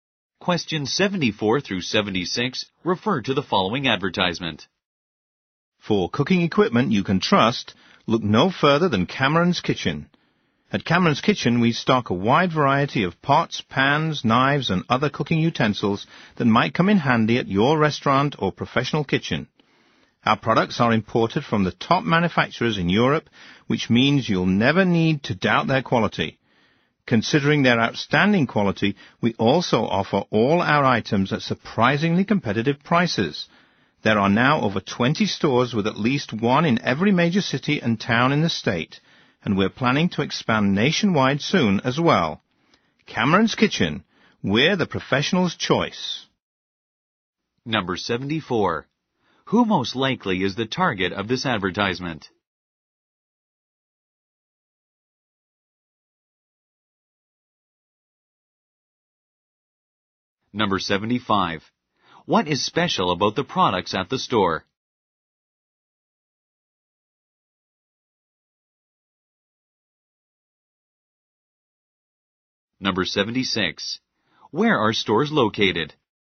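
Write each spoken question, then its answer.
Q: Who most likely is the target of this advertisement?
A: Restaurants and professional cooks

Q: What is special about the products at the store?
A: They are imported from top European manufacturers

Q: Where are stores located?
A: In every major city and town in the state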